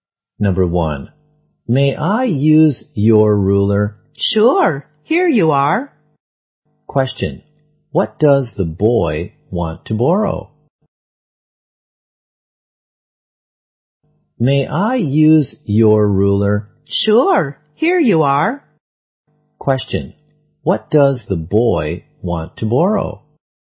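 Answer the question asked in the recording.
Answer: A ruler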